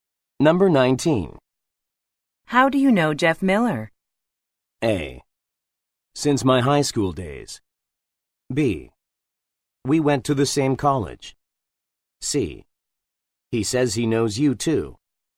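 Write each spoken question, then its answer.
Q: How do you know Jeff Miller?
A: B: We went to the same college.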